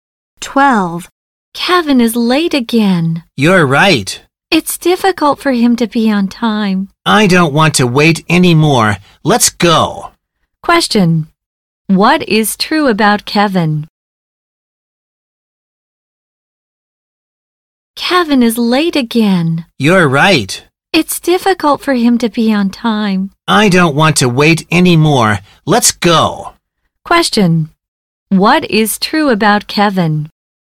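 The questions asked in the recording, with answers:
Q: What is true about Kevin?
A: He is often late; it's hard for him to be on time.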